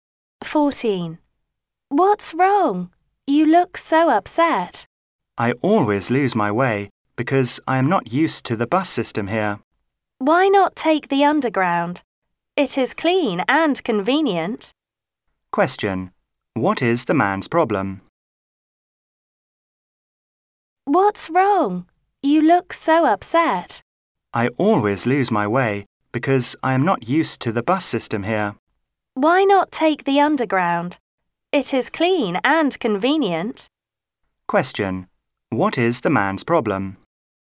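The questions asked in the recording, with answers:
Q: What is the man's problem?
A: He always gets lost because he isn't used to the bus system.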